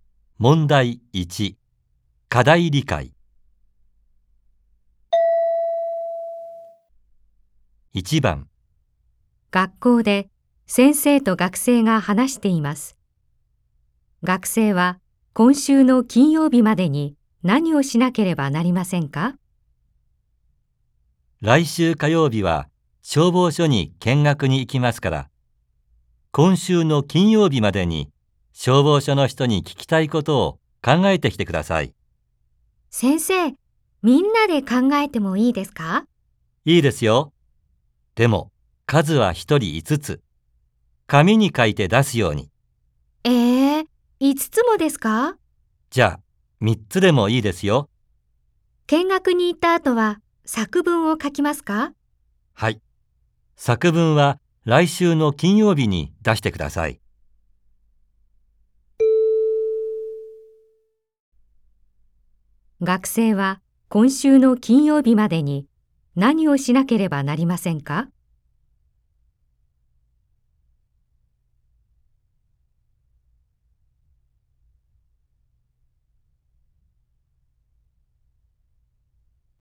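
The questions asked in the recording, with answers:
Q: 学生は今週の金曜日までに何をしなければなりませんか?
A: 消防署の人に聞きたいことを3つ考えて紙に書いて出す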